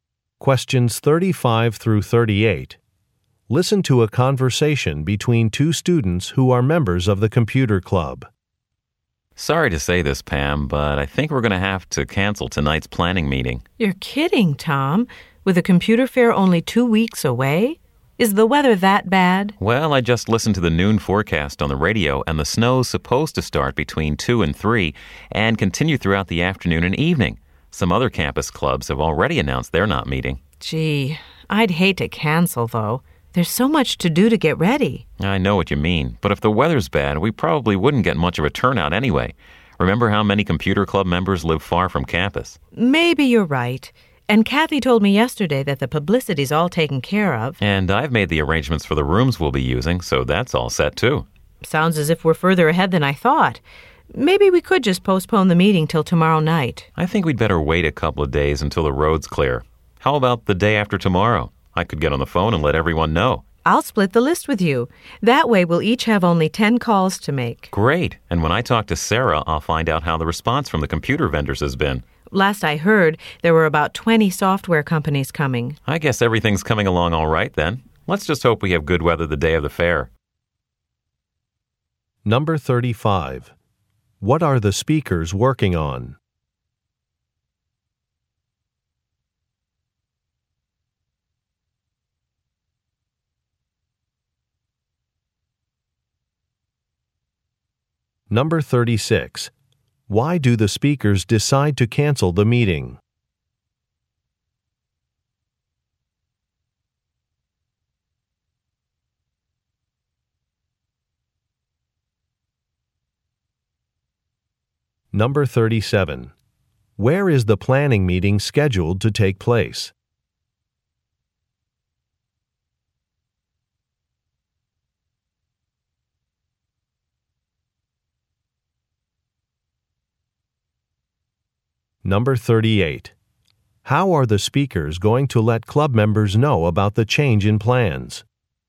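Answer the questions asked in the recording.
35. Planning a computer fair
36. Snow is forecast
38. By telephoning them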